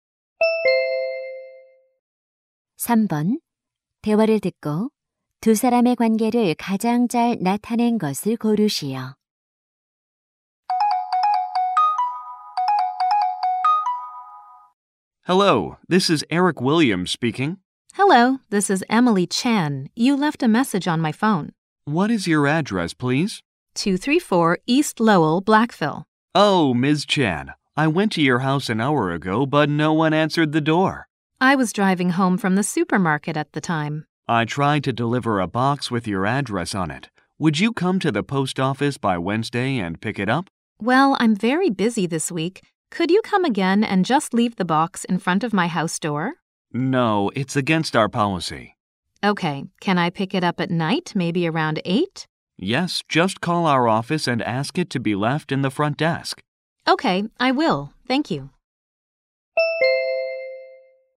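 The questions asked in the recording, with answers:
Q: 대화를 듣고 두 사람의 관계를 가장 잘 나타낸 것을 고르시오.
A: 우체부 - 고객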